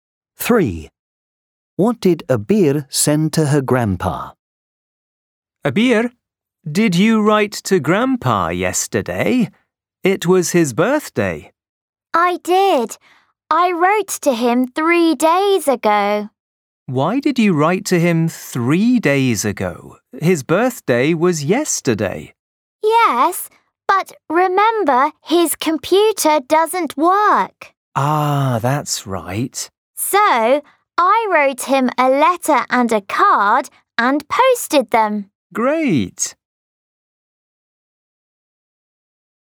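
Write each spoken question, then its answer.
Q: What did Abir send to her grandpa?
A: A letter and a card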